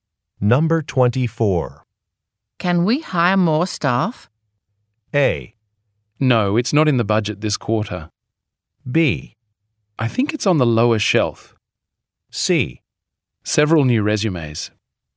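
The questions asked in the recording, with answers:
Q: Can we hire more staff?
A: A: No, it's not in the budget this quarter.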